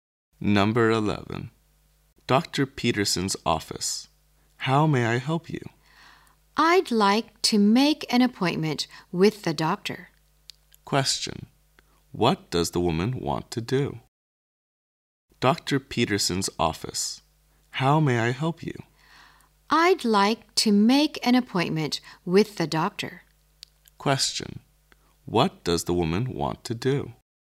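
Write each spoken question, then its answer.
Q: What does the woman want to do?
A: Make an appointment with the doctor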